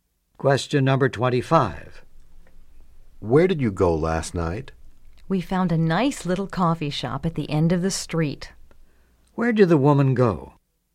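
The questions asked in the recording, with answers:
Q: Where did the woman go?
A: To a little coffee shop at the end of the street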